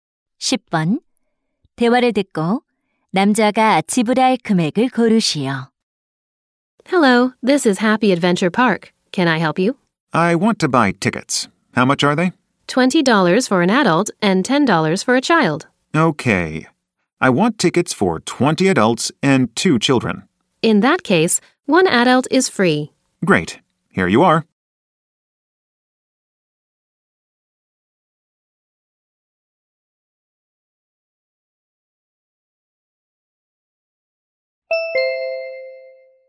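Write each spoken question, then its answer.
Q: 대화를 듣고 남자가 지불할 금액을 고르시오.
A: 400달러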